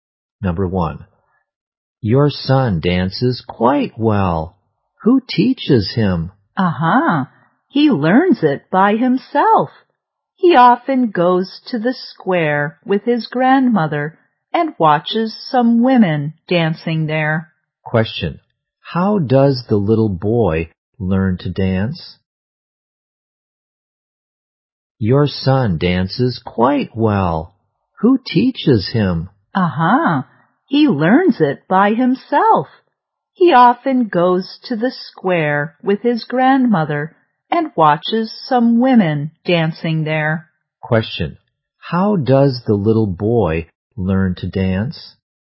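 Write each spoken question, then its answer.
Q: How does the little boy learn to dance?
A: By himself, by watching women dancing in the square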